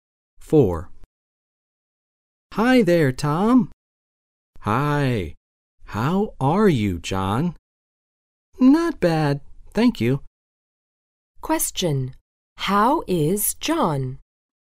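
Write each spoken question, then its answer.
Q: How is John?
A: Not bad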